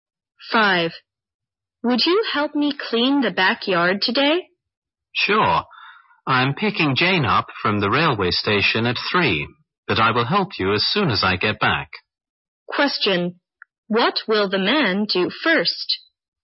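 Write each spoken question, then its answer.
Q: What will the man do first?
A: Pick Jane up from the railway station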